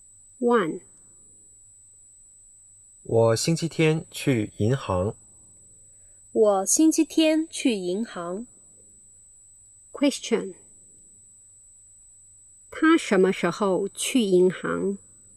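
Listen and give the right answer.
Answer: 星期天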